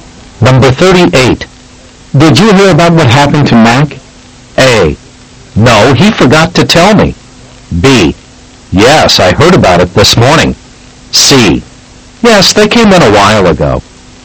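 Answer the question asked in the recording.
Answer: B: Yes, I heard about it this morning.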